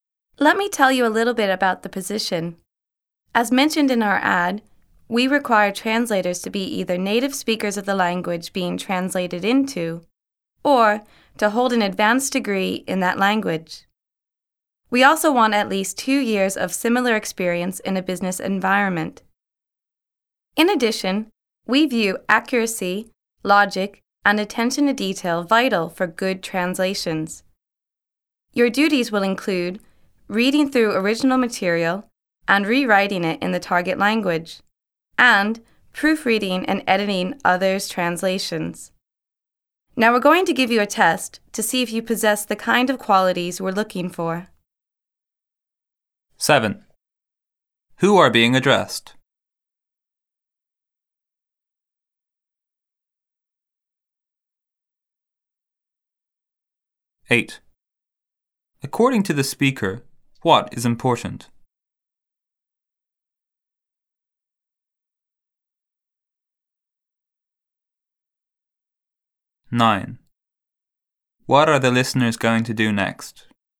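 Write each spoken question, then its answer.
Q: Who are being addressed?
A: Job applicants for translator positions

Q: According to the speaker, what is important?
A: Accuracy, logic, and attention to detail

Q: What are the listeners going to do next?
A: Take a test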